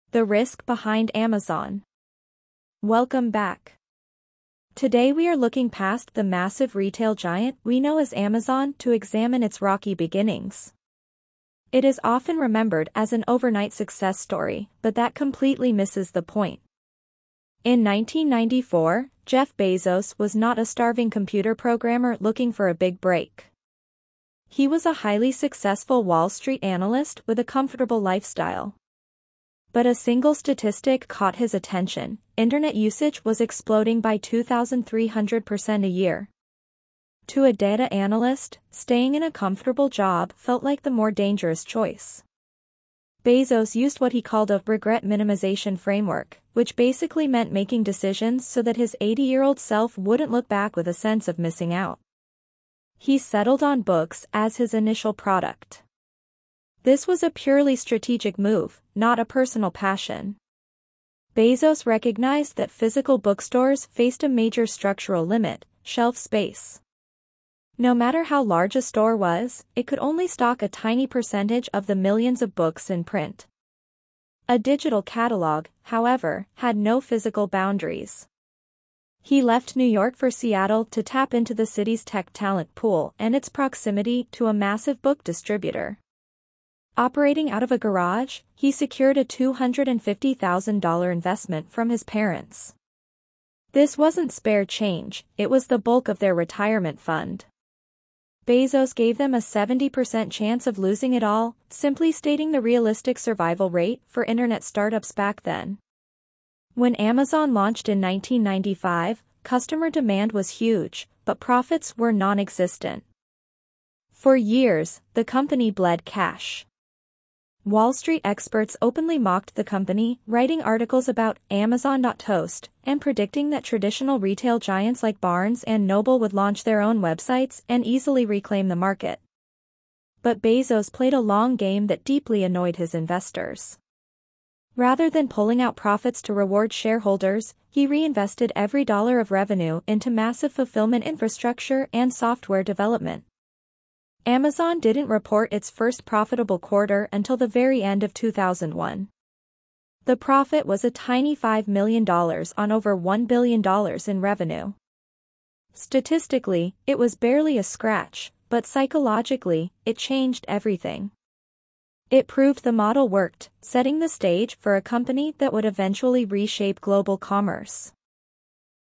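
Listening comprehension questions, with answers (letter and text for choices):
II. Read the following questions and choose the correct answer:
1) What is the speaker's perspective on how most people view Amazon's history?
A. People focus too much on the tech tools Bezos used in his garage.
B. The common public perception ignores the slow and difficult reality of its growth.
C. Most people exaggerate how wealthy Jeff Bezos was before he started the company.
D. The public mistakenly believes Amazon started as a traditional bookstore.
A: B. The common public perception ignores the slow and difficult reality of its growth.

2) Based on the podcast, how did Bezos view his high-paying Wall Street job in 1994?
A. As a secure position that would allow him to save up enough money to start a business later.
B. As a boring career that didn't allow him to use his true talent as a computer programmer.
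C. As a professional trap that might cause him emotional dissatisfaction later in life.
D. As an unstable environment due to the rapid growth of the internet market.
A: C. As a professional trap that might cause him emotional dissatisfaction later in life.

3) What made books a more strategic product for an online store compared to a physical store?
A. Books were easier for a new website to track and organize in a database.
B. Physical stores were limited by geography, whereas online stores could ship books faster.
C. The book market was expanding by 2,300% every year.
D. Websites could overcome the inventory limitations that trapped traditional retailers.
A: D. Websites could overcome the inventory limitations that trapped traditional retailers.

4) What does the speaker imply about the investment made by Bezos's parents?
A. They trusted their son's business data more than the warnings of Wall Street experts.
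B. They were financially comfortable enough to survive a 70% loss of their savings.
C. Their decision to invest was driven more by family support than financial safety.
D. They didn't realize how high the failure rate was for internet startups at the time.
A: C. Their decision to invest was driven more by family support than financial safety.

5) Why did Bezos target Seattle as his business location?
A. It was the most affordable city for renting warehouse and garage space.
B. It allowed him to minimize travel time between his suppliers and his target market.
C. The city offered immediate access to the specific resources and labor his business required.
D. It was a strategic midpoint between his parents' home and New York.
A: C. The city offered immediate access to the specific resources and labor his business required.

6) Why did Wall Street analysts predict that traditional retail giants would beat Amazon?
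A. Traditional retailers already had larger fulfillment centers and better software.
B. Experts assumed established brands would easily adapt to the internet and use their size as an advantage.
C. Amazon was losing customers rapidly to physical bookstores in 1995.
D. Traditional bookstores were intentionally lowering their prices to force Amazon out of business.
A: B. Experts assumed established brands would easily adapt to the internet and use their size as an advantage.

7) What did the phrase "Amazon.toast" reveal about the business experts of the 1990s?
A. They were frustrated that Amazon refused to pay out dividends to shareholders.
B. They dismissed Amazon's long-term potential because of its immediate financial losses.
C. They didn't understand how an online catalog worked compared to a physical shelf.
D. They were trying to manipulate stock prices to help traditional bookstores.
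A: B. They dismissed Amazon's long-term potential because of its immediate financial losses.

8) Why did Bezos's early business decisions cause tension with his investors?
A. He was expanding into non-book products before the book business was stable.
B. He prioritized building long-term infrastructure over delivering short-term financial returns.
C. He mismanaged the initial $250,000 investment on expensive software.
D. He refused to share the company's financial data and revenue reports with them.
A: B. He prioritized building long-term infrastructure over delivering short-term financial returns.

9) Why does the speaker describe Amazon's first profit in 2001 as a "psychological" victory?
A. It made investors realize they were finally going to become incredibly wealthy.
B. It was a huge financial windfall that completely erased all previous company debts.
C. It forced critics to accept that an internet-based retail model was actually viable.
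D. It allowed Bezos to finally move the company out of his garage and into an office.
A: C. It forced critics to accept that an internet-based retail model was actually viable.

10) What central business concept is illustrated by the narrative arc of this script?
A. Upfront financial sacrifice and patience are often required to validate a disruptive business model.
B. Starting a business in a garage is a reliable method to reduce initial operational costs.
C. Statistical data analysis is the only accurate way to predict consumer trends.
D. A company cannot survive unless it secures significant funding from family members.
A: A. Upfront financial sacrifice and patience are often required to validate a disruptive business model.

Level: High-Intermediate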